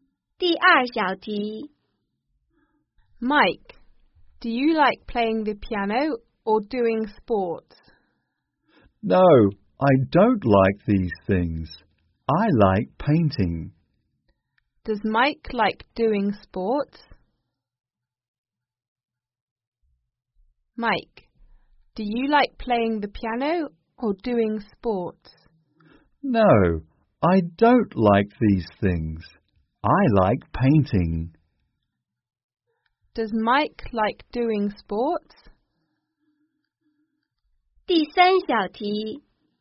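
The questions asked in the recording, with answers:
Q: Does Mike like doing sports?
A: No, he doesn't. He likes painting.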